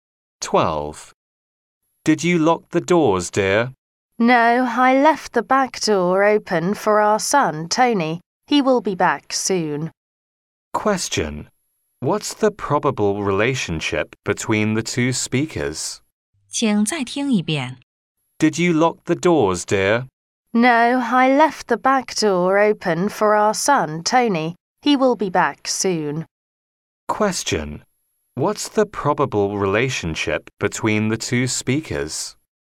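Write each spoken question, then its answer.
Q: What's the probable relationship between the two speakers?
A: Husband and wife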